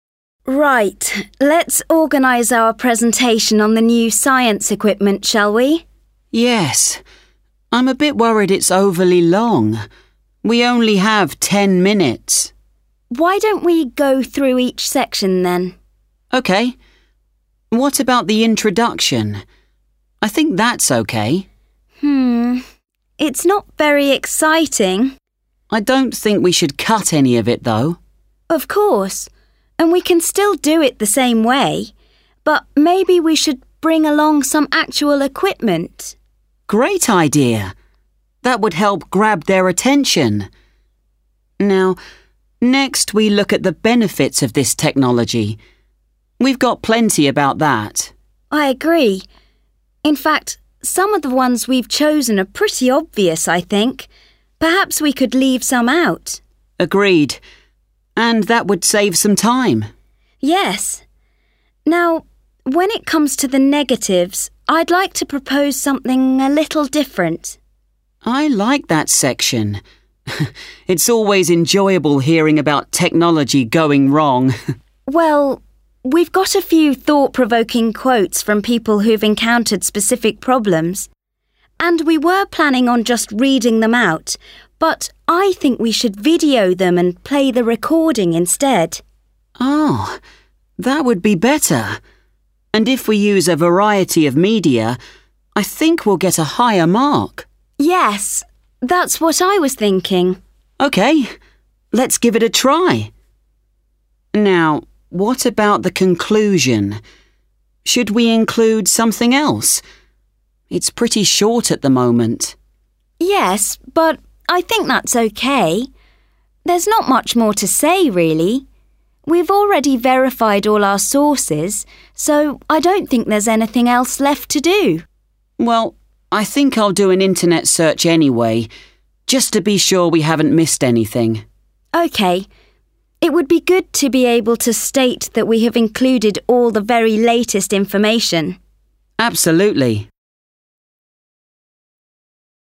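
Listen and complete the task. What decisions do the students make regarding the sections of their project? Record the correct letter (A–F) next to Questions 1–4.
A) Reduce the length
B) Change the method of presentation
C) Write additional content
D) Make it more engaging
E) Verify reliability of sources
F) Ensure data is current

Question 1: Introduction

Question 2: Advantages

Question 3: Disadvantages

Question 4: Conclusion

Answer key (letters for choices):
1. D
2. A
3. B
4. F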